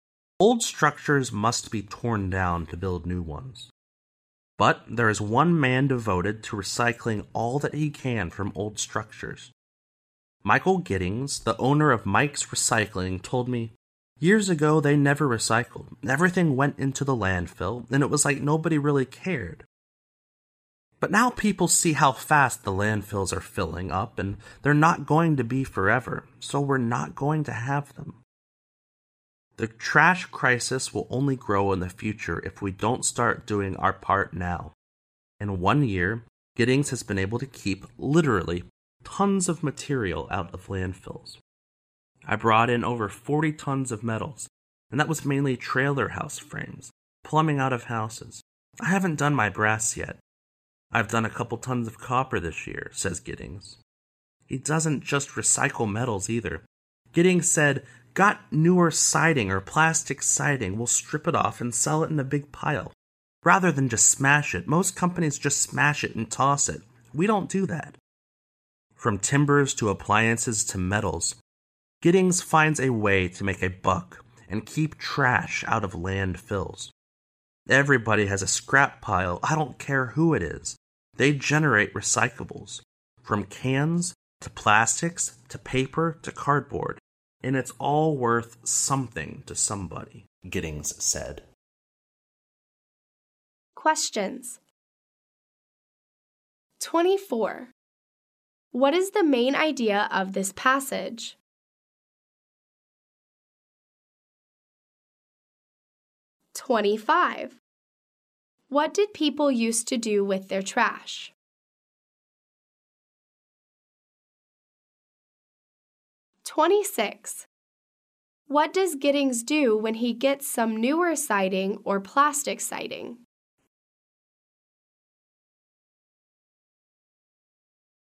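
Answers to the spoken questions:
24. A man recycles materials from old structures to keep trash out of landfills
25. They put everything into the landfill
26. He strips it off and sells it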